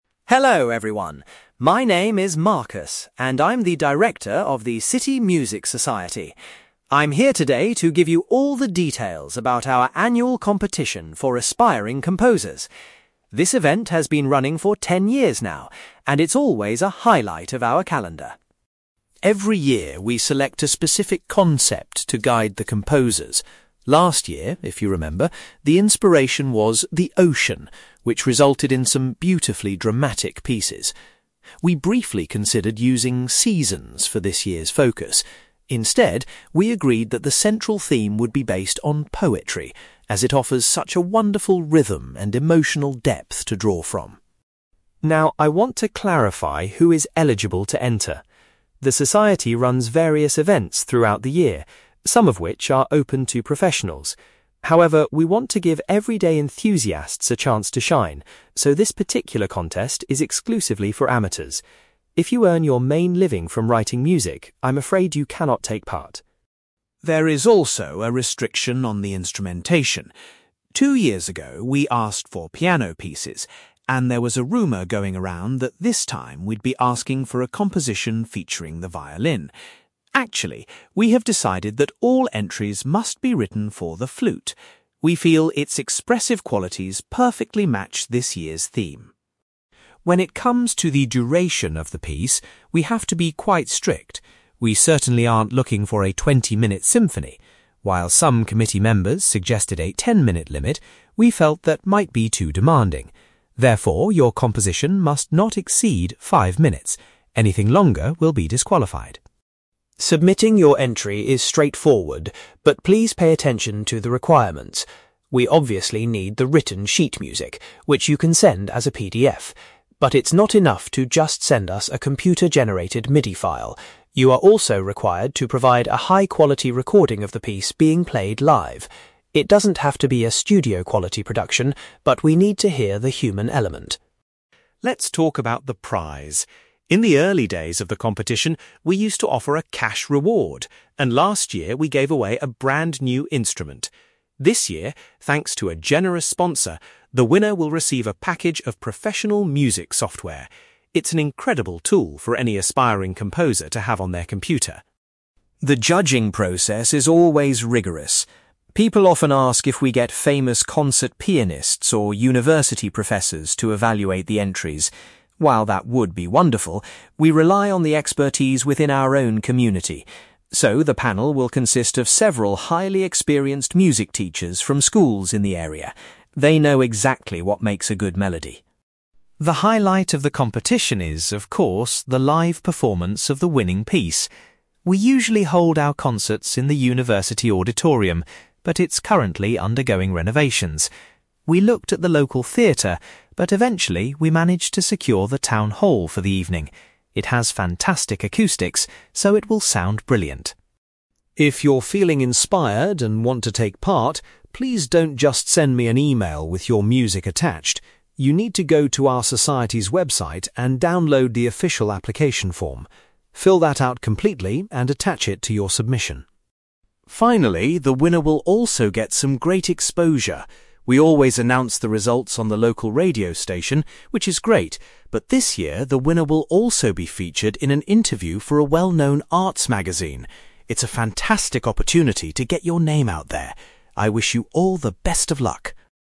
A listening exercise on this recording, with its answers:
You will hear a man called Marcus giving a presentation about an annual music competition organized by a local society. For questions 9-18, complete the sentences with a word or short phrase.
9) Marcus says that the subject of (9)........................... was chosen to inspire the composers this year.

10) Marcus points out that the competition is strictly limited to (10)........................... .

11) Competitors are required to compose a piece of music specifically for the (11)........................... .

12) Marcus emphasizes that pieces submitted must have a maximum length of (12)........................... .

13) Along with the sheet music, entrants must submit a live (13)........................... of their composition.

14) The prize for the winning composer is some professional (14)........................... for their computer.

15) A group of local (15)........................... will be responsible for judging the musical entries.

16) The winning composition will be performed live at the local (16)........................... .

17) Candidates must complete an (17)........................... in order to enter the competition.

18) The winner will have the chance to be interviewed in a regional (18)........................... .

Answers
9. poetry
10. amateurs
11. flute
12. 5 minutes / five minutes
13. recording
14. software
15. music teachers
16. town hall
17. application form
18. magazine

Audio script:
Marcus: Hello everyone. My name is Marcus, and I'm the director of the City Music Society. I'm here today to give you all the details about our annual competition for aspiring composers. This event has been running for ten years now, and it's always a highlight of our calendar.
Every year, we select a specific concept to guide the composers. Last year, if you remember, the inspiration was 'the ocean', which resulted in some beautifully dramatic pieces. We briefly considered using 'seasons' for this year's focus. Instead, we agreed that the central theme would be based on poetry, as it offers such a wonderful rhythm and emotional depth to draw from.
Now, I want to clarify who is eligible to enter. The society runs various events throughout the year, some of which are open to professionals. However, we want to give everyday enthusiasts a chance to shine, so this particular contest is exclusively for amateurs. If you earn your main living from writing music, I'm afraid you cannot take part.
There is also a restriction on the instrumentation. Two years ago, we asked for piano pieces, and there was a rumour going around that this time we'd be asking for a composition featuring the violin. Actually, we have decided that all entries must be written for the flute. We feel its expressive qualities perfectly match this year's theme.
When it comes to the duration of the piece, we have to be quite strict. We certainly aren't looking for a twenty-minute symphony! While some committee members suggested a ten-minute limit, we felt that might be too demanding. Therefore, your composition must not exceed 5 minutes. Anything longer will be disqualified.
Submitting your entry is straightforward, but please pay attention to the requirements. We obviously need the written sheet music, which you can send as a PDF. But it's not enough to just send us a computer-generated MIDI file. You are also required to provide a high-quality recording of the piece being played live. It doesn't have to be a studio-quality production, but we need to hear the human element.
Let's talk about the prize! In the early days of the competition, we used to offer a cash reward, and last year we gave away a brand new instrument. This year, thanks to a generous sponsor, the winner will receive a package of professional music software. It's an incredible tool for any aspiring composer to have on their computer.
The judging process is always rigorous. People often ask if we get famous concert pianists or university professors to evaluate the entries. While that would be wonderful, we rely on the expertise within our own community. So, the panel will consist of several highly experienced music teachers from schools in the area. They know exactly what makes a good melody!
The highlight of the competition is, of course, the live performance of the winning piece. We usually hold our concerts in the university auditorium, but it's currently undergoing renovations. We looked at the local theatre, but eventually, we managed to secure the town hall for the evening. It has fantastic acoustics, so it will sound brilliant.
If you're feeling inspired and want to take part, please don't just send me an email with your music attached. You need to go to our society's website and download the official application form. Fill that out completely and attach it to your submission.
Finally, the winner will also get some great exposure. We always announce the results on the local radio station, which is great, but this year, the winner will also be featured in an interview for a well-known arts magazine. It's a fantastic opportunity to get your name out there! I wish you all the best of luck.

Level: B2